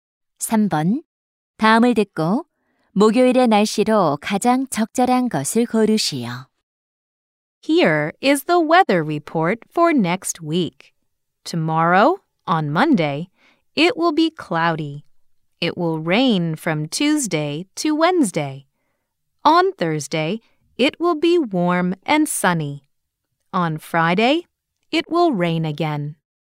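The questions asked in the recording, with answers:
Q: 다음을 듣고 목요일의 날씨로 가장 적절한 것을 고르시오.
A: 따뜻하고 맑음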